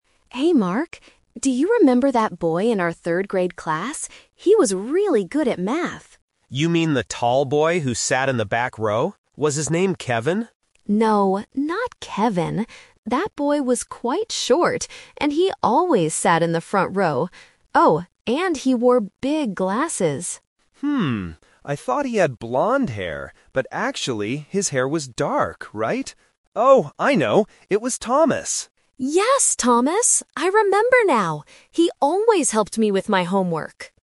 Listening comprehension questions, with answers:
Listen to two old classmates, Lisa and Mark, trying to remember a friend's name. Then, read the questions below and choose the correct answer (A, B, or C) for each question.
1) Where did the boy sit in the classroom?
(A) In the back row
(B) In the front row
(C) Next to the window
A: In the front row

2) What did the boy look like?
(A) He was tall.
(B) He had blond hair.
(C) He wore big glasses.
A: He wore big glasses.

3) What was the boy's name?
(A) Kevin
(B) Mark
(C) Thomas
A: Thomas

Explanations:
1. Lisa clearly states, "...he always sat in the front row." Option (A) is a trap; Mark guesses the boy sat in the back row at first, but Lisa says no. Option (C) is a plausible place to sit in a classroom, but it is never mentioned in the audio.
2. Lisa describes the boy by saying, "Oh, and he wore big glasses!" Option (A) is a trap; Mark asks if it was the "tall boy," but Lisa says the boy was actually "quite short." Option (B) is a trap; Mark thought the boy had blond hair, but he realizes the boy actually had dark hair.
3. Mark finally remembers and says, "Oh, I know! It was Thomas!" and Lisa agrees. Option (A) is a trap; Kevin is the name of the tall boy in the back row, not the boy they are looking for. Option (B) is a trap; Mark is the name of the man speaking, not the boy from third grade.

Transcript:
Lisa: Hey Mark, do you remember that boy in our third-grade class? He was really good at math.
Mark: You mean the tall boy who sat in the back row? Was his name Kevin?
Lisa: No, not Kevin. That boy was quite short, and he always sat in the front row. Oh, and he wore big glasses!
I thought he had blond hair, but actually, his hair was dark, right? Oh, I know! It was Thomas!

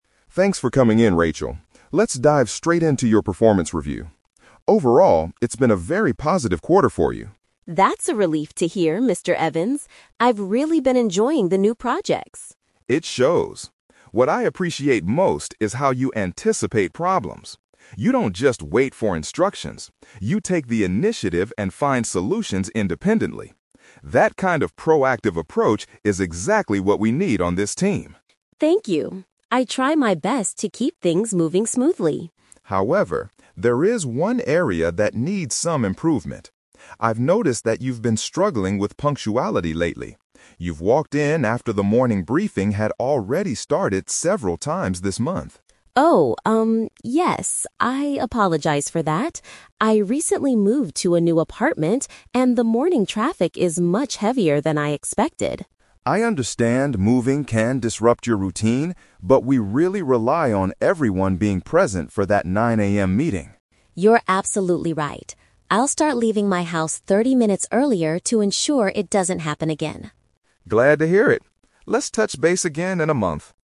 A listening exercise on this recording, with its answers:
Listen to a performance review between a manager, Mr. Evans, and an employee, Rachel. For each question, choose the correct answer A, B, or (C).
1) What does the manager like most about Rachel's work style?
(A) She always follows his instructions perfectly.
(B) She identifies and solves problems on her own.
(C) She is willing to work overtime on new projects.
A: She identifies and solves problems on her own.

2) What negative feedback does Mr. Evans give Rachel?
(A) She frequently arrives at the office behind schedule.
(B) She rarely participates or speaks up in morning briefings.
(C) She needs to improve the quality of her team reports.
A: She frequently arrives at the office behind schedule.

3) Why has Rachel been experiencing this problem?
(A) She forgets what time the 9 AM meeting begins.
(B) She has been staying up too late finishing her work.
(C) Her commute to work takes longer than she thought.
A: Her commute to work takes longer than she thought.

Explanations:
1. Mr. Evans praises Rachel because she can "anticipate problems," "take the initiative," and "find solutions independently." Option B is a clear paraphrase of these proactive traits. Trap Alert: Option A is a trap because the audio specifically says she does not just "wait for instructions." Option C mentions "new projects," but nothing is said about working overtime.
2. Mr. Evans mentions she is "struggling with punctuality" and has walked in late "several times this month." Arriving "behind schedule" is a B1-level synonym for being late. Trap Alert: Option B is a trap because the audio mentions the "morning briefing," but the problem is that she misses the beginning of it, not that she sits quietly and rarely participates. Option C is not mentioned.
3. Rachel explains she moved to a new apartment and the "morning traffic is much heavier than I expected." This means her journey to work (commute) is taking longer. Trap Alert: Option A is a trap because the 9 AM meeting is mentioned, but she didn't forget the time. Option B is a plausible real-life reason for being late, but she blames the traffic, not staying up late.

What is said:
Evans: Thanks for coming in, Rachel. Let's dive straight into your performance review. Overall, it's been a very positive quarter for you.
Rachel: That's a relief to hear, Mr. Evans. I've really been enjoying the new projects.
Mr. Evans: It shows. What I appreciate most is how you anticipate problems. You don't just wait for instructions; you take the initiative and find solutions independently. That kind of proactive approach is exactly what we need on this team.
Rachel: Thank you. I try my best to keep things moving smoothly.
Mr. Evans: However, there is one area that needs some improvement. I've noticed that you've been struggling with punctuality lately. You've walked in after the morning briefing had already started several times this month.
Rachel: Oh, um... yes, I apologize for that. I recently moved to a new apartment, and the morning traffic is much heavier than I expected.
Mr. Evans: I understand moving can disrupt your routine, but we really rely on everyone being present for that 9 AM meeting.
Rachel: You're absolutely right. I'll start leaving my house thirty minutes earlier to ensure it doesn't happen again.
Mr. Evans: Glad to hear it. Let's touch base again in a month.

